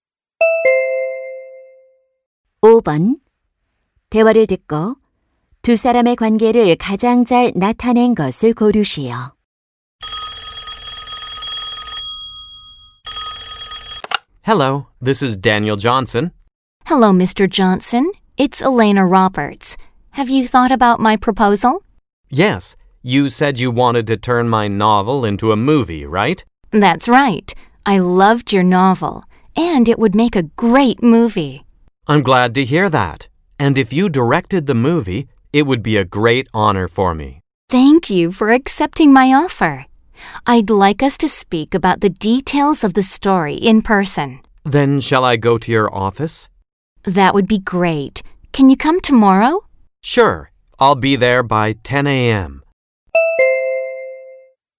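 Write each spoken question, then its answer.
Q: 대화를 듣고 두 사람의 관계를 가장 잘 나타낸 것을 고르시오.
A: 소설가 - 영화감독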